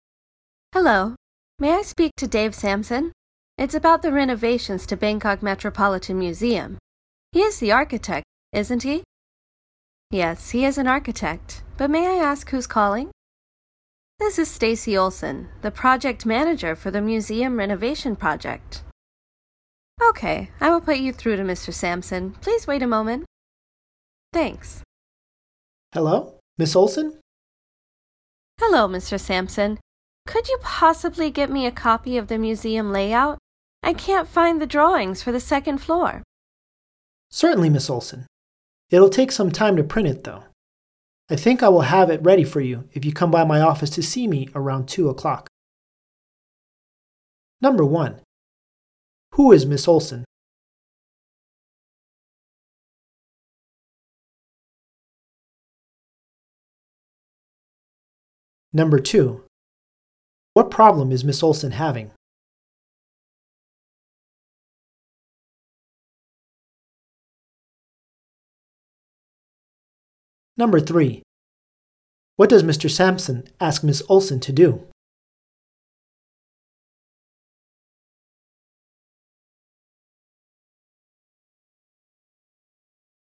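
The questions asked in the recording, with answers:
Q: Who is Miss Olson?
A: The project manager for the museum renovation project

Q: What problem is Miss Olson having?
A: She can't find the drawings for the second floor

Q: What does Mr. Sampson ask Miss Olson to do?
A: Come by his office around 2 o'clock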